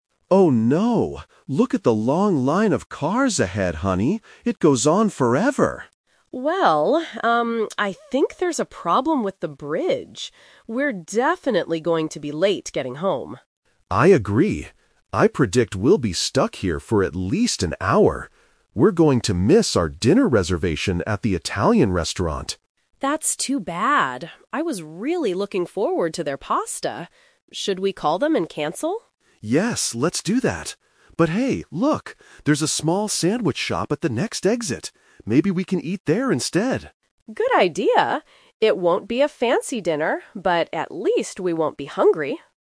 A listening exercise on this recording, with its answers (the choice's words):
Listen to the conversation between a husband and wife in a car. Choose the correct answer (A, B, or C).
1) Why does the wife think they will be late?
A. Because of a car accident.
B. Because of a problem with the bridge.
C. Because of the heavy rain.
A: Because of a problem with the bridge.

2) What was their original plan for dinner?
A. To eat at an Italian restaurant.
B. To cook pasta at home.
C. To go to a sandwich shop.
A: To eat at an Italian restaurant.

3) What is their final decision?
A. To wait in traffic for two hours.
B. To cancel their dinner and go home hungry.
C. To eat at a shop near the next exit.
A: To eat at a shop near the next exit.

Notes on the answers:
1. The wife says, "I think there's a problem with the bridge."
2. The husband mentions missing their "dinner reservation at the Italian restaurant."
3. At the end, the husband suggests the sandwich shop at the next exit and the wife says, "Good idea."

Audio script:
Husband: Oh no! Look at the long line of cars ahead, honey. It goes on forever!
I think there's a problem with the bridge. We're definitely going to be late getting home.
Husband: I agree. I predict we'll be stuck here for at least an hour. We're going to miss our dinner reservation at the Italian restaurant.
Wife: That's too bad. I was really looking forward to their pasta. Should we call them and cancel?
Husband: Yes, let's do that. But hey, look! There's a small sandwich shop at the next exit. Maybe we can eat there instead?
Wife: Good idea. It won't be a fancy dinner, but at least we won't be hungry!

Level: A2